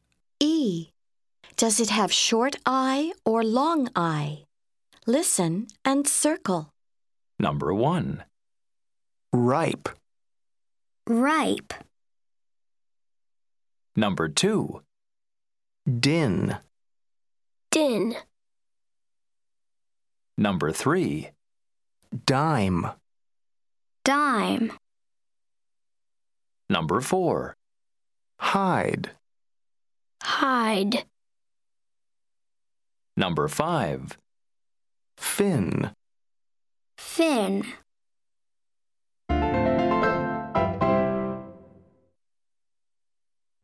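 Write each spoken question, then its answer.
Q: Ripe.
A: long I

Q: Dime.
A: long I

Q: Hide.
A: long I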